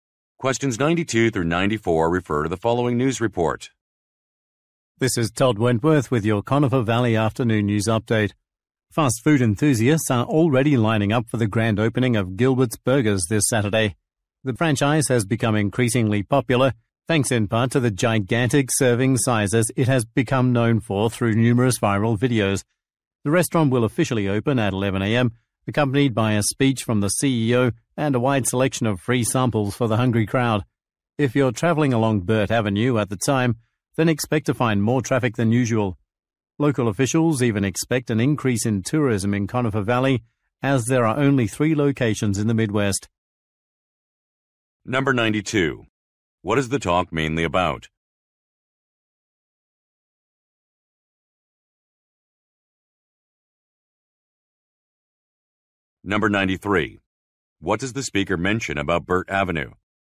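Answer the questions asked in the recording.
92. The grand opening of a burger restaurant.
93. There will be more traffic than usual.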